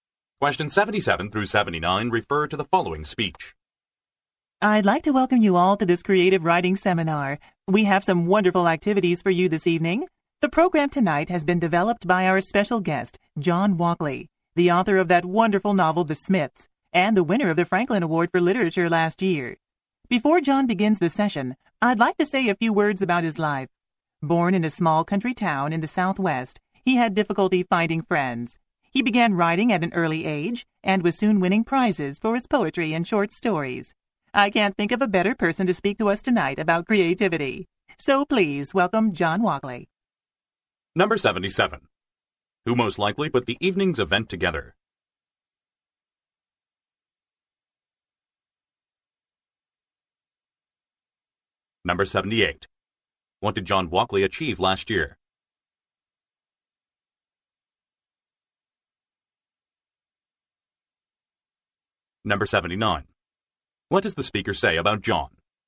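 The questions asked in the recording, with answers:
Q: Who most likely put the evening's event together?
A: John Walkley

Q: What did John Walkley achieve last year?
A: He won the Franklin Award for Literature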